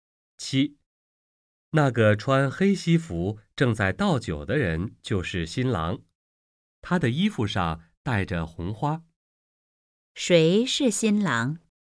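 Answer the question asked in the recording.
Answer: 那个穿黑西服正在倒酒、衣服上戴着红花的人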